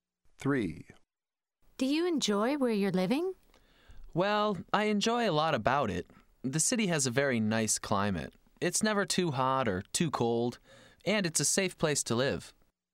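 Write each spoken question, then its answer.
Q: Do you enjoy where you're living?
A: Yes, likes it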